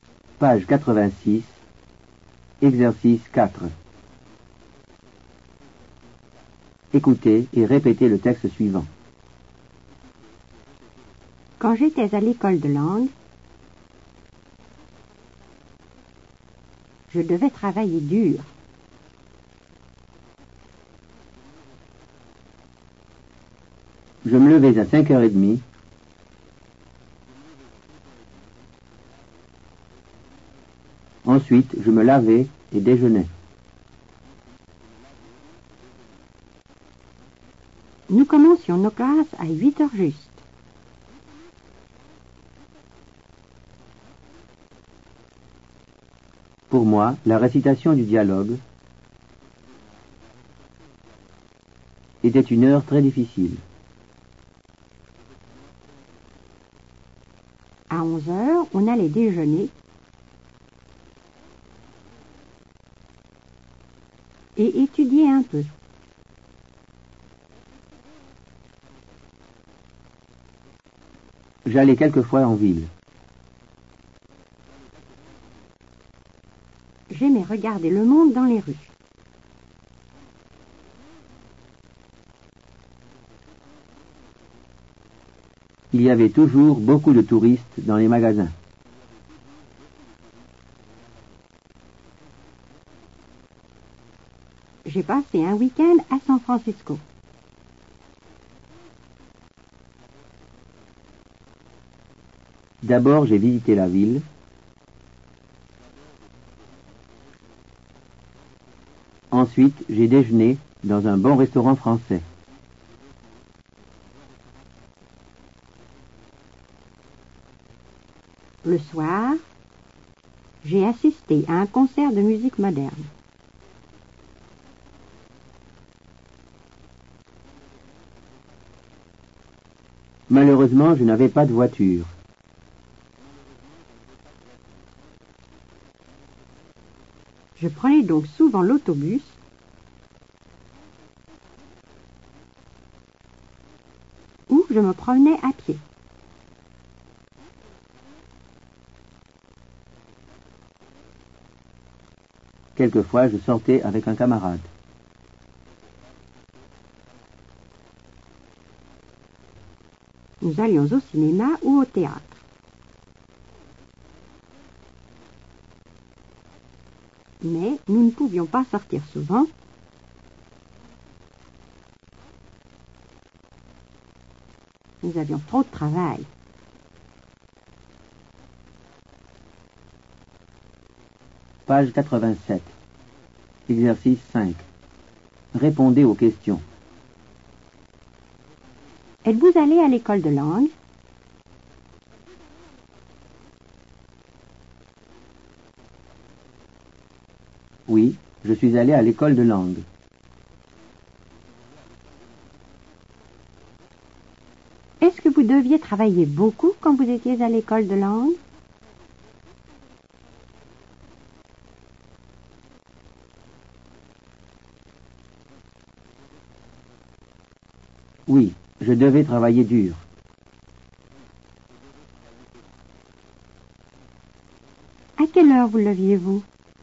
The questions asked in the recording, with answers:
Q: À quelle heure vous leviez-vous?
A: Je me levais à 5h30.